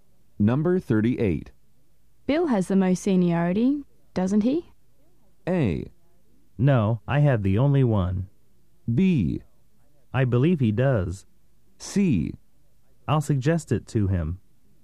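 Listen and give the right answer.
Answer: B: I believe he does.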